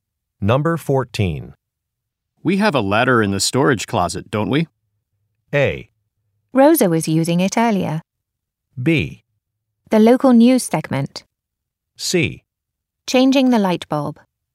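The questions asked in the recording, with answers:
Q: We have a ladder in the storage closet, don't we?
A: A: Rosa was using it earlier.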